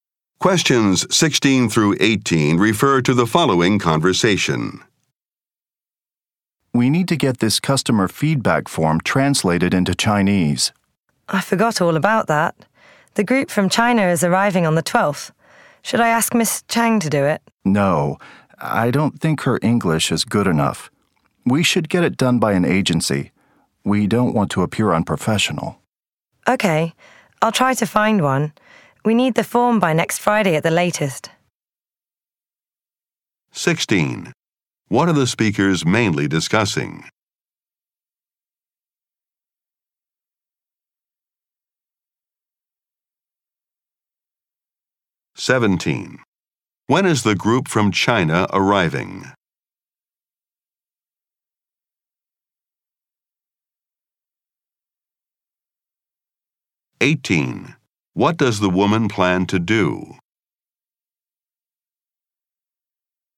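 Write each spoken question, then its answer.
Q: What are the speakers mainly discussing?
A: Getting a customer feedback form translated into Chinese

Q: When is the group from China arriving?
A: On the 12th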